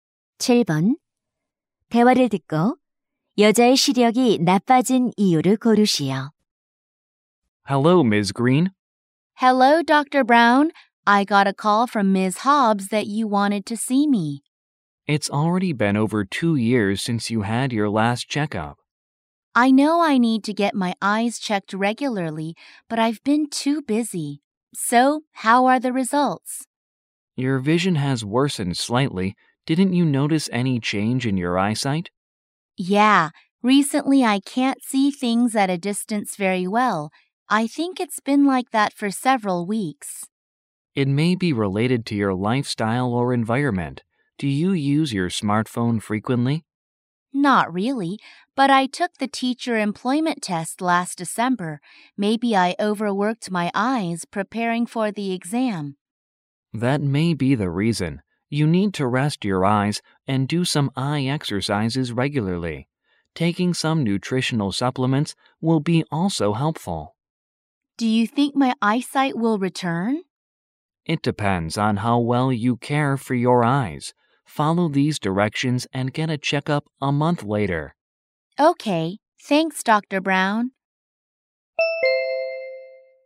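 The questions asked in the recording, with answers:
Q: 대화를 듣고 여자의 시력이 나빠진 이유를 고르시오.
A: 교원 임용 시험을 준비하느라 눈을 혹사해서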